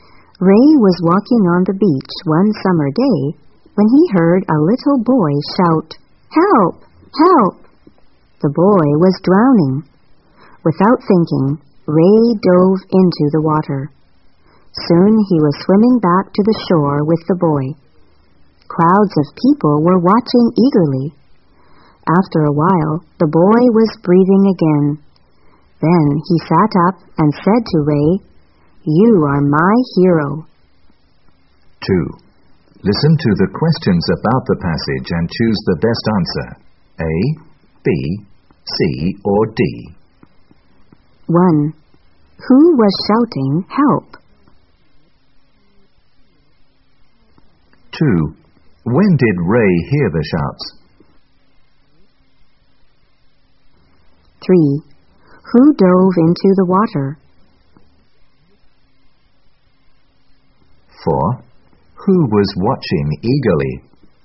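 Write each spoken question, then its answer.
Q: Who was shouting, "Help"?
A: A little boy

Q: When did Ray hear the shouts?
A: One summer day, while walking on the beach

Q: Who dove into the water?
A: Ray

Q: Who was watching eagerly?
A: Crowds of people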